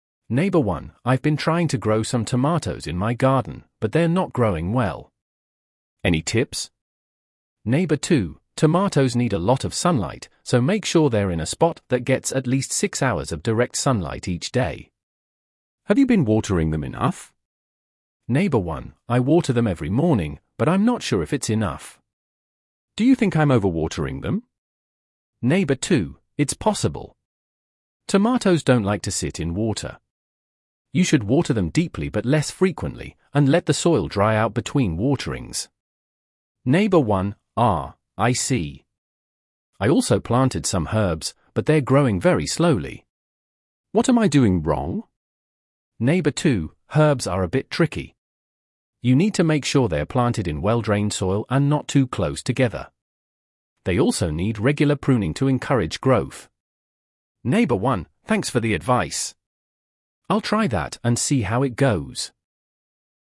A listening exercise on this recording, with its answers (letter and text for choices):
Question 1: What is Neighbor 1's main issue?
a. The plants are getting too much sunlight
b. The tomatoes are not growing well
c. The herbs are growing too fast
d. The soil is too dry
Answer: b. The tomatoes are not growing well

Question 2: What does Neighbor 2 recommend for growing tomatoes?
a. Keep them in the shade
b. Water them every day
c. Plant them in direct sunlight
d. Water them frequently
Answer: c. Plant them in direct sunlight

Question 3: How often should tomatoes be watered, according to Neighbor 2?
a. Every day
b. Deeply but less frequently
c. Only once a week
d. Every morning and night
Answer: b. Deeply but less frequently

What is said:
Neighbor 1: "I've been trying to grow some tomatoes in my garden, but they're not growing well. Any tips?"
Neighbor 2: "Tomatoes need a lot of sunlight, so make sure they're in a spot that gets at least 6 hours of direct sunlight each day. Have you been watering them enough?"
Neighbor 1: "I water them every morning, but I'm not sure if it's enough. Do you think I'm overwatering them?"
Neighbor 2: "It's possible. Tomatoes don't like to sit in water. You should water them deeply but less frequently, and let the soil dry out between waterings."
Neighbor 1: "Ah, I see. I also planted some herbs, but they're growing very slowly. What am I doing wrong?"
Neighbor 2: "Herbs are a bit tricky. You need to make sure they're planted in well-drained soil and not too close together. They also need regular pruning to encourage growth."
Neighbor 1: "Thanks for the advice! I'll try that and see how it goes."